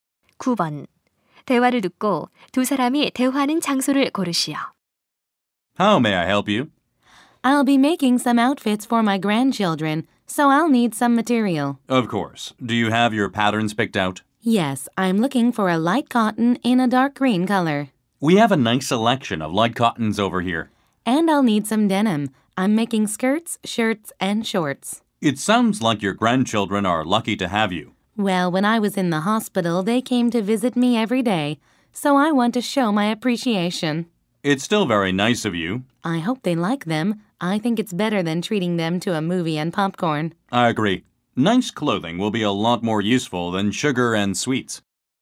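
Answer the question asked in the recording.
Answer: 옷감 가게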